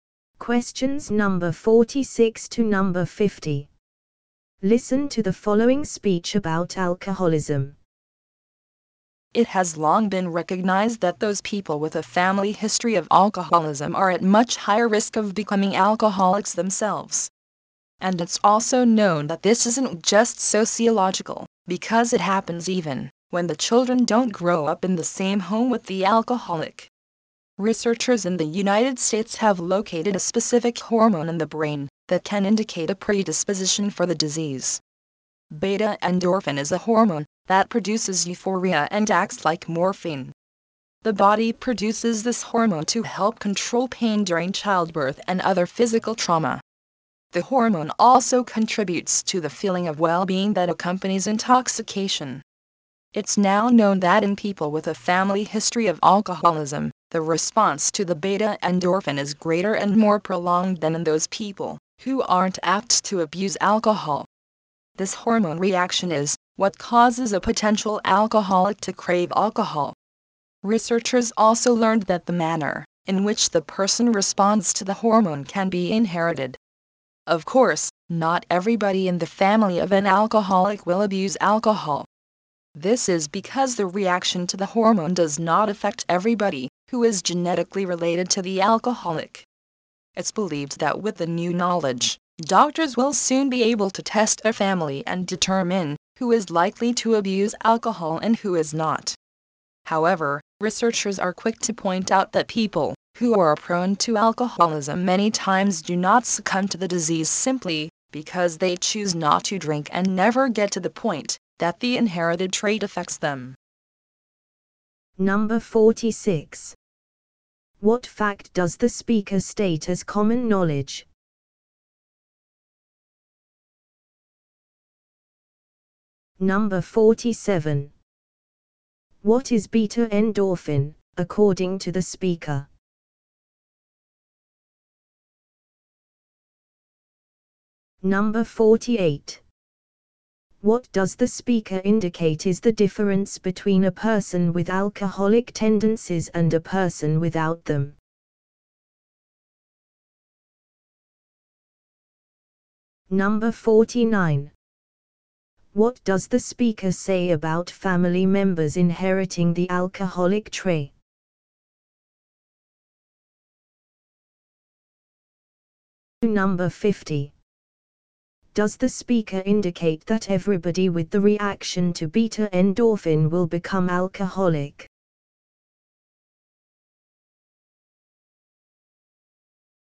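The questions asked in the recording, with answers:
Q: What fact does the speaker state as common knowledge?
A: People with a family history of alcoholism are at much higher risk of becoming alcoholics.

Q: What is beta endorphin, according to the speaker?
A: A brain hormone that produces euphoria and acts like morphine.

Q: What does the speaker indicate is the difference between a person with alcoholic tendencies and a person without them?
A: Their response to beta endorphin is greater and lasts longer.

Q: Does the speaker indicate that everybody with the reaction to beta endorphin will become alcoholic?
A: No; many never become alcoholics because they choose not to drink.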